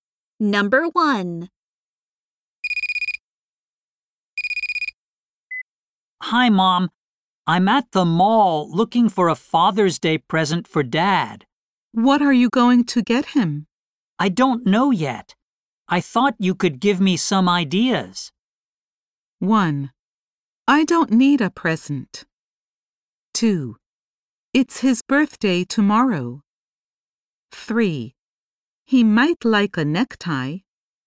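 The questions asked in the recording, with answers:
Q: I don't know yet. I thought you could give me some ideas.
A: 3: He might like a necktie.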